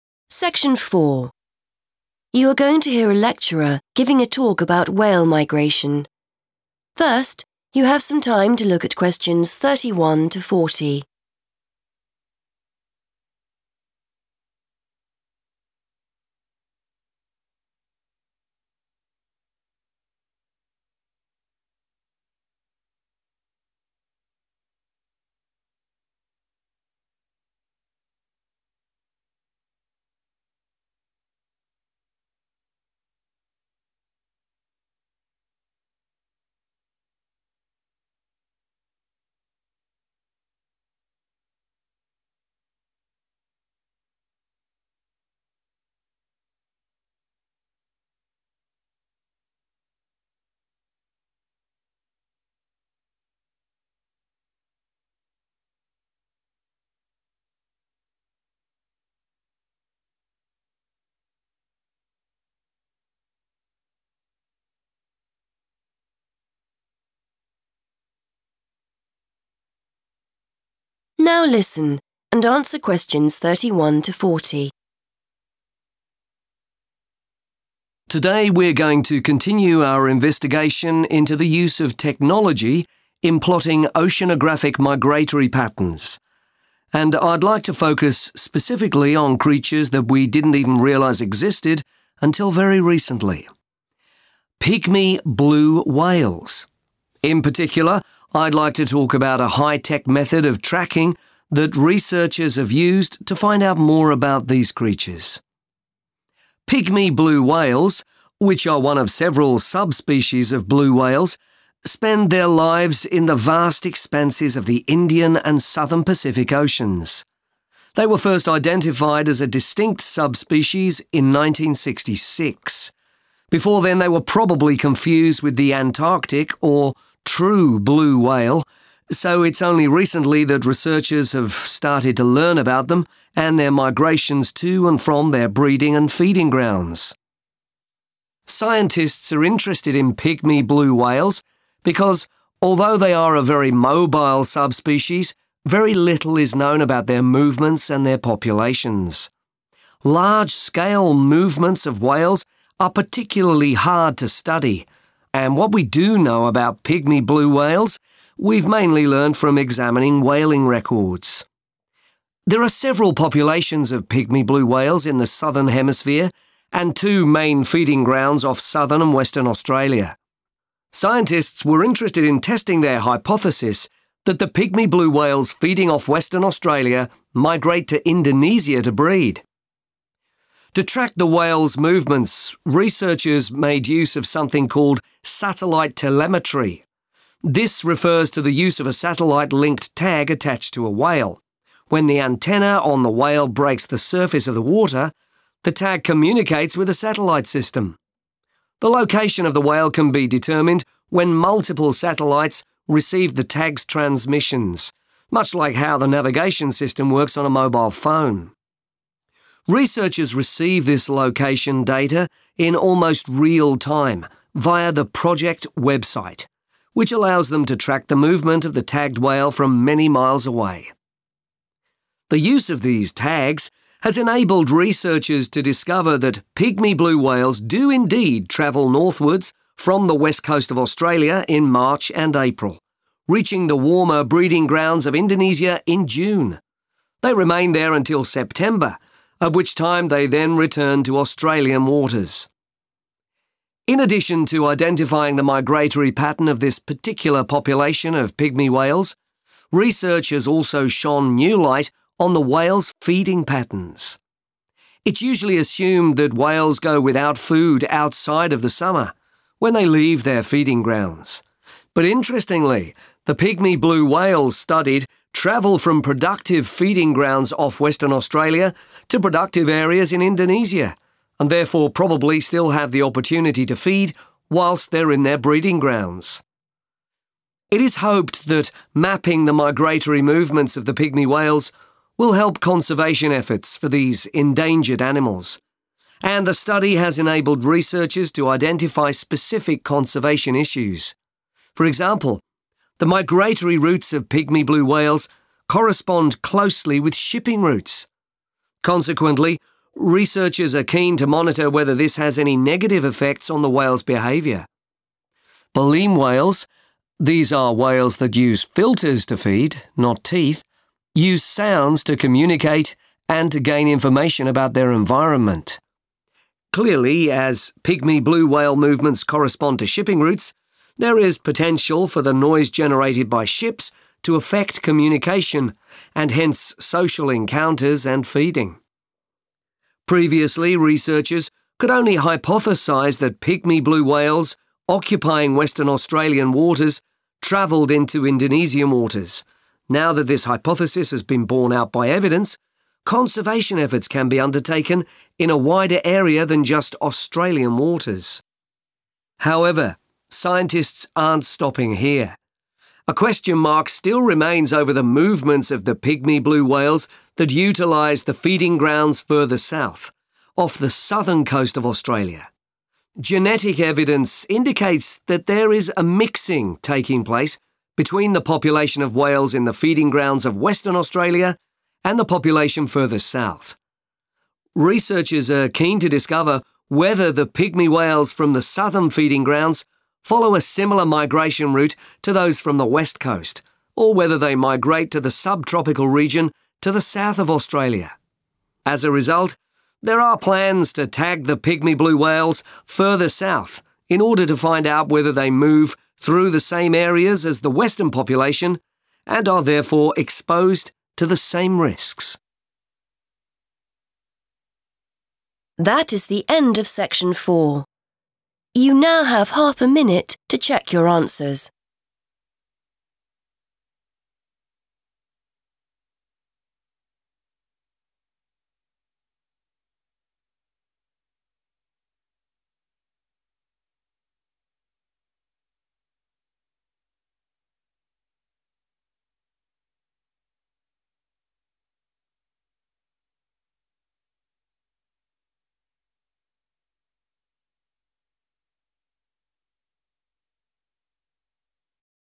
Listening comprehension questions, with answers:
Complete the lecture notes below. Write NO MORE THAN TWO WORDS for each answer.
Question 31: Pygmy blue whales: Before 1966 it is likely they were _____ with the Antarctic blue whales.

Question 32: Aim of study: To find out more about their _____ and movements.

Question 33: When the antenna communicates with a number of satellites, the whale's _____ can be identified.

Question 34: Researchers access the results using the project _____ .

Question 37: Pygmy whales do not go without _____ whilst they are in their breeding grounds.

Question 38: Conservation issues: The effect of _____ routes on communication between whales.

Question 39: Conservation efforts can take place over a(n) _____ area now there is evidence that they migrate out of Australian waters.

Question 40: Future studies: To explore whether pygmy whales off the southern coast of Australia follow the same northerly migratory routes as those studied or whether they travel to a(n) _____ region to the south of Australia.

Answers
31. confused
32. populations / population
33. location
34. website
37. food / feeding
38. shipping
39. wider
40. subtropical

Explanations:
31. The correct answer is 'confused' because the lecturer explains that until 1966, people did not realize pygmy blue whales were a different type. Before this time, people probably saw them and thought they were the 'Antarctic' or 'true' blue whale. To be 'confused' in this context means to mix up the identity of one thing with another.
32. The correct answer is population(s) because the lecturer explains that scientists want to study pygmy blue whales to learn more about where they go (movements) and how many live in their different groups (populations). The notes ask for the aim of the study, and these are the two main things scientists want to find out.
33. The correct answer is "location" because the transcript explains how satellite technology is used to find where the whales are. It mentions that after the whale's tag sends signals to many satellites, the "location of the whale can be determined." In the lecture notes, the word "identified" is used as a synonym for "determined."
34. The correct answer is 'website' because the lecturer says researchers use it to see the tracking information. When a whale with a special tag comes to the surface, its location is sent to a satellite. Then, this location information is sent to the project's website. Researchers look at this website to see where the whale is moving.
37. The correct answer is 'food / feeding' because the lecturer explains that most people think whales stop eating once they leave their main feeding grounds. However, pygmy blue whales move between two areas that both have plenty of food. This means they likely keep eating in their breeding grounds. Key terms that point to this include 'go without food' and 'opportunity to feed'.
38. The correct answer is 'shipping' because the transcript explains that a major conservation problem is how the whales' paths match up with 'shipping routes.' The speaker explains that the loud sounds made by these big boats can make it difficult for the whales to talk to each other or 'communicate.' This match between whale paths and boat paths is a key concern for the researchers.
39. The correct answer is "wider" because the lecturer explains that now that researchers have proof (evidence) that the whales move to different locations, the work to save and protect them (conservation efforts) can happen in a much bigger region (a wider area) beyond just the waters of Australia.
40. The correct answer is subtropical because the speaker mentions a specific alternative path for whales living off the south coast. While researchers know where the west coast whales go, they are still trying to find out if the southern whales go to a 'subtropical region' located to the south of Australia.

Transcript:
Lecturer: Today we're going to continue our investigation into the use of technology in plotting oceanographic migratory patterns and I'd like to focus specifically on creatures that we didn't even realise existed until very recently: pygmy blue whales. In particular, I'd like to talk about a high-tech method of tracking that researchers have used to find out more about these creatures.
Pygmy blue whales, which are one of several sub-species of blue whales, spend their lives in the vast expanses of the Indian and southern Pacific Oceans. They were first identified as a distinct subspecies in 1966. Before then they were probably confused with the Antarctic or 'true' blue whale, so it's only recently that researchers have started to learn about them and their migrations to and from their breeding and feeding grounds.
Scientists are interested in pygmy blue whales because although they are a very mobile subspecies, very little is known about their movements and their populations. Large-scale movements of whales are particularly hard to study, and what we do know about pygmy blue whales we've mainly learnt from examining whaling records. There are several populations of pygmy blue whales in the southern hemisphere and two main feeding grounds off southern and western Australia. Scientists were interested in testing their hypothesis that the pygmy blue whales feeding off western Australia migrate to Indonesia to breed.
To track the whales' movements, researchers made use of something called satellite telemetry. This refers to the use of a satellite-linked tag attached to a whale. When the antenna on the whale breaks the surface of the water, the tag communicates with a satellite system. The location of the whale can be determined when multiple satellites receive the tag's transmissions, much like how the navigation system works on a mobile phone. Researchers receive this location data in almost real time via the project website, which allows them to track the movement of the tagged whale from many miles away.
The use of these tags has enabled researchers to discover that pygmy blue whales do indeed travel northwards from the west coast of Australia in March and April, reaching the warmer breeding grounds of Indonesia in June. They remain there until September, at which time they then return to Australian waters.
In addition to identifying the migratory pattern of this particular population of pygmy whales, research has also shone new light on the whales' feeding patterns. It's usually assumed that whales go without food outside of the summer, when they leave their feeding grounds. But interestingly, the pygmy blue whales studied travel from productive feeding grounds off western Australia to productive areas in Indonesia and therefore probably still have the opportunity to feed whilst they're in their breeding grounds.
It is hoped that mapping the migratory movements of the pygmy whales will help conservation efforts for these endangered animals, and the study has enabled researchers to identify specific conservation issues. For example, the migratory routes of pygmy blue whales correspond closely with shipping routes. Consequently, researchers are keen to monitor whether this has any negative effects on the whales' behaviour. Baleen whales - these are whales that use filters to feed, not teeth - use sounds to communicate and to gain information about their environment. Clearly, as pygmy blue whale movements correspond to shipping routes, there is potential for the noise generated by ships to affect communication and hence social encounters and feeding.
Previously, researchers could only hypothesise that pygmy blue whales occupying western Australian waters travelled into Indonesian waters. Now that this hypothesis has been borne out by evidence, conservation efforts can be undertaken in a wider area than just Australian waters.
However, scientists aren't stopping here. A question mark still remains over the movements of the pygmy blue whales that utilise the feeding grounds further south, off the southern coast of Australia. Genetic evidence indicates that there is a mixing taking place between the population of whales in the feeding grounds of western Australia and the population further south. Researchers are keen to discover whether the pygmy whales from the southern feeding grounds follow a similar migration route to those from the west coast or whether they migrate to the subtropical region to the south of Australia. As a result, there are plans to tag the pygmy blue whales further south in order to find out whether they move through the same areas as the western population and are therefore exposed to the same risks.